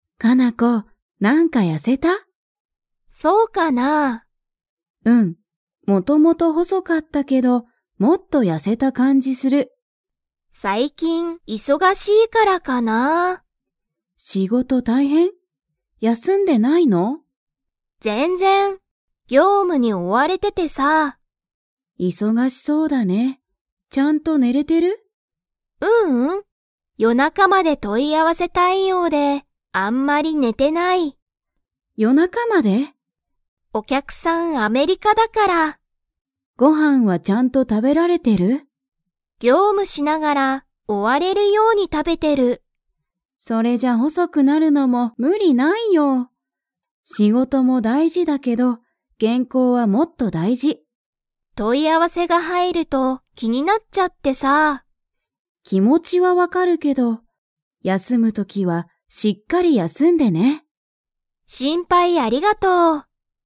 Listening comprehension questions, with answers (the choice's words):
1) カナコは業務ぎょうむに 。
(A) 追おわれてる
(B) 追おわれてない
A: 追おわれてる

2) カナコのお客きゃくさんは、どこにいますか?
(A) 東京とうきょう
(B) 大阪おおさか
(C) アメリカ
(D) イギリス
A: アメリカ

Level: Level 4